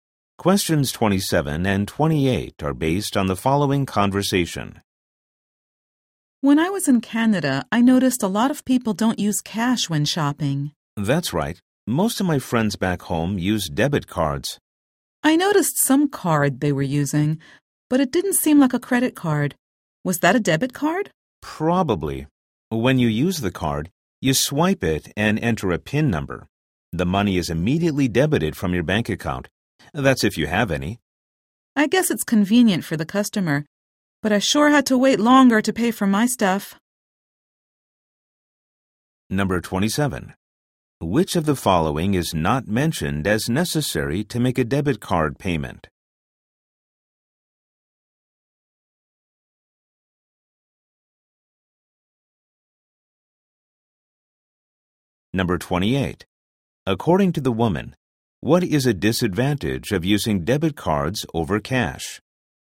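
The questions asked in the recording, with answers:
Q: According to the woman, what is a disadvantage of using debit cards over cash?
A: Waiting longer to pay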